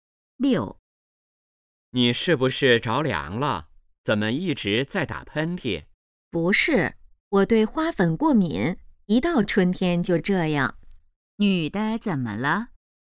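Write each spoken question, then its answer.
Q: 女的怎么了?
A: 对花粉过敏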